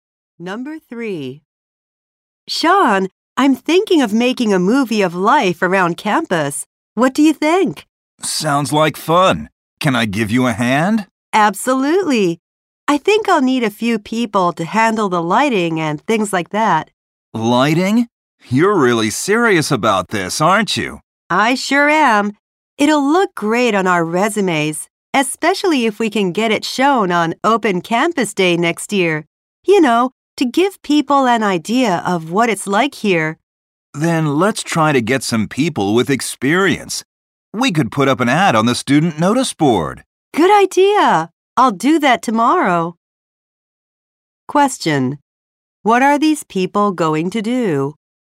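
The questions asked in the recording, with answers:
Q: What are these people going to do?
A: Make a movie about campus life and put up an ad to find experienced people.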